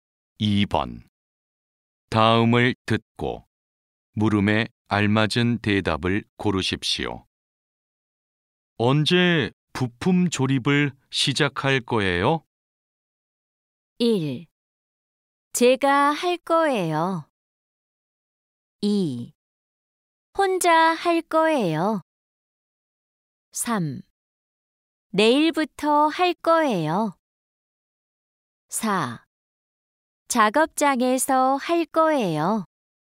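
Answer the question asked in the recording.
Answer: 3: 내일부터 할 거예요.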